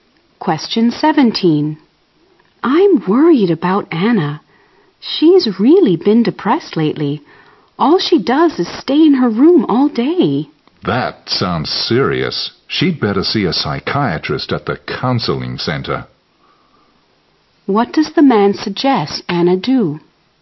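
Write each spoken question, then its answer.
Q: What does the man suggest Anna do?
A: See a psychiatrist at the counseling center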